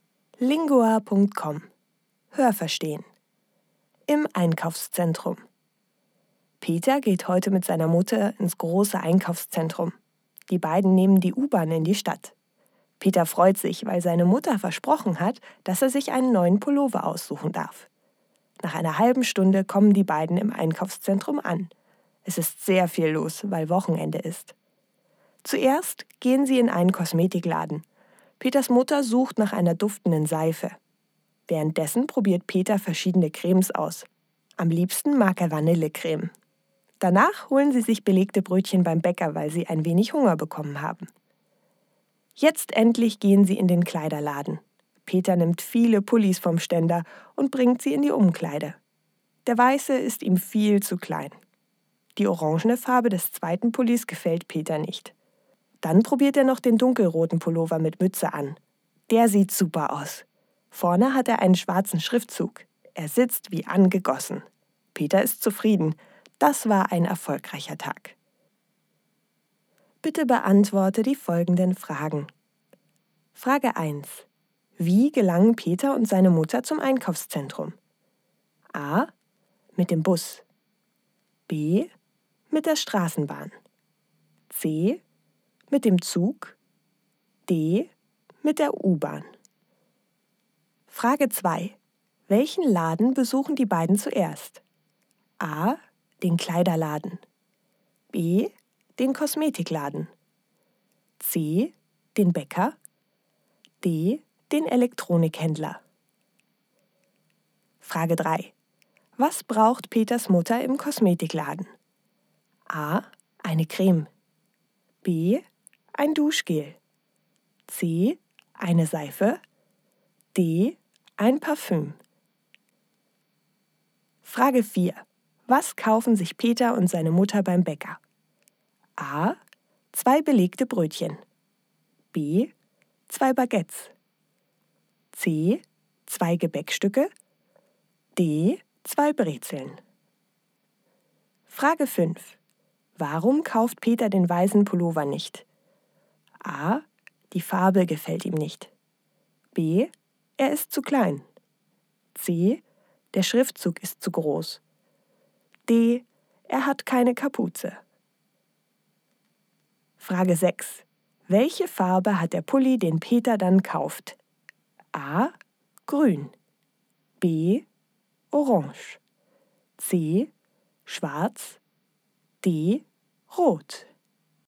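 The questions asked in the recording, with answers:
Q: Wie gelangen Peter und seine Mutter zum Einkaufszentrum?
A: D: Mit der U-Bahn.

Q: Welchen Laden besuchen die beiden zuerst?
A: B: Den Kosmetikladen.

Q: Was braucht Peters Mutter im Kosmetikladen?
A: C: Eine Seife.

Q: Was kaufen sich Peter und seine Mutter beim Bäcker?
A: A: Zwei belegte Brötchen.

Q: Warum kauft Peter den weißen Pullover nicht?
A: B: Er ist zu klein.

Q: Welche Farbe hat der Pulli, den Peter dann kauft?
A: D: Rot.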